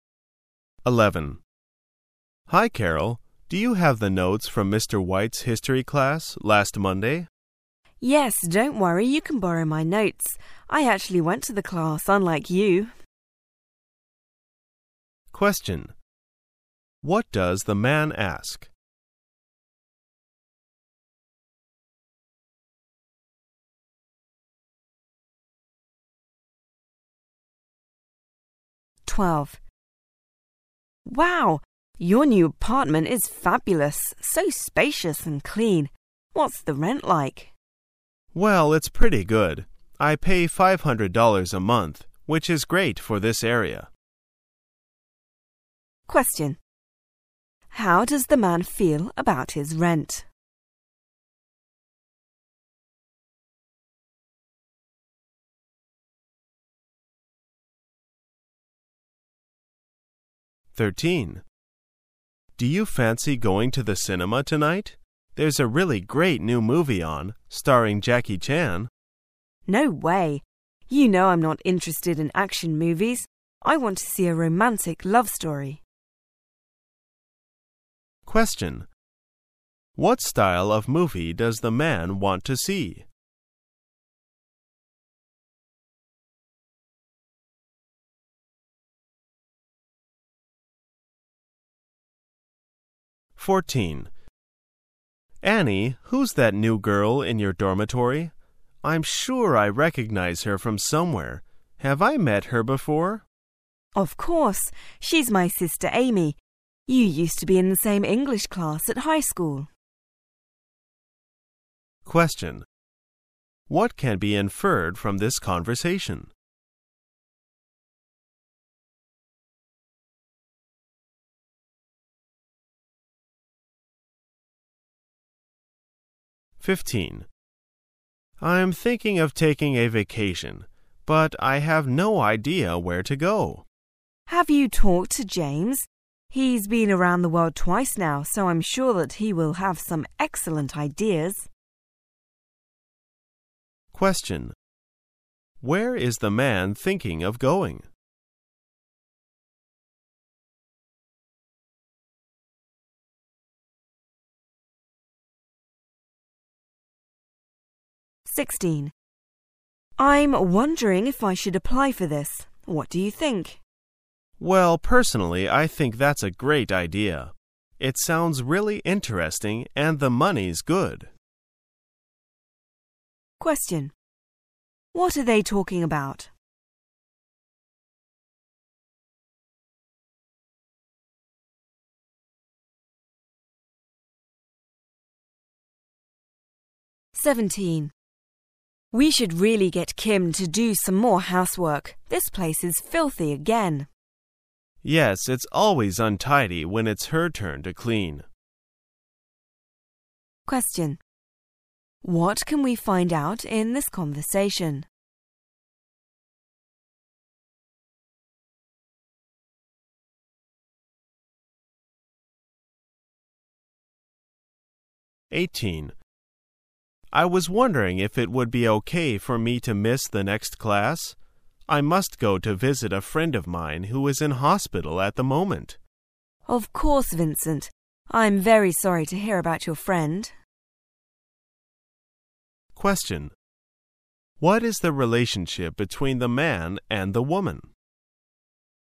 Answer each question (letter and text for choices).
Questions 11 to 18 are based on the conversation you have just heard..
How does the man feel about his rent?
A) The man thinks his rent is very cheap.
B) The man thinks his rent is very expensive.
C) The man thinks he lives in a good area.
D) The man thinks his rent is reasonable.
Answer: D) The man thinks his rent is reasonable.

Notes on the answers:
此题考查通过内容预测的能力。关键点在题目是问男士认为租金怎样,'which is great for this area'是答案所在,which在这里指代租金,'在这个地区这是个很好的租价'与reasonable对应。常表示房租还有affordable负担起的。